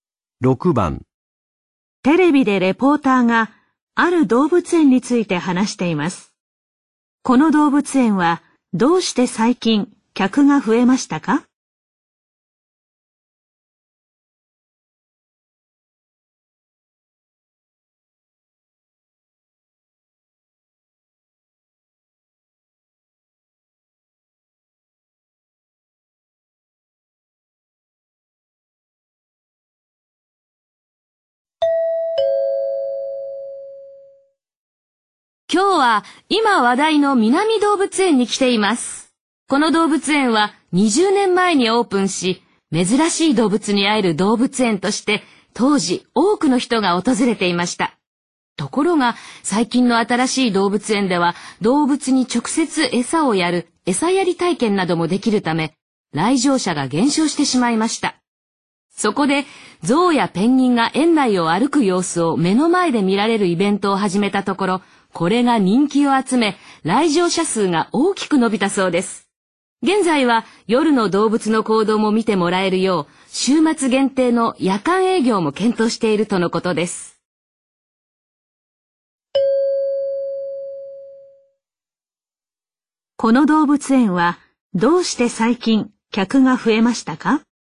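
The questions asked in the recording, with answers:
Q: この動物園はどうして最近客が増えましたか?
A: ゾウやペンギンが園内を歩く様子を目の前で見られるイベントを始めたから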